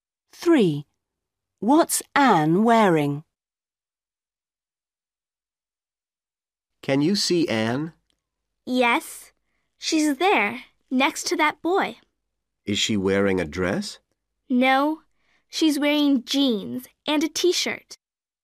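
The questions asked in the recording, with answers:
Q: What's Anne wearing?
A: Jeans and a t-shirt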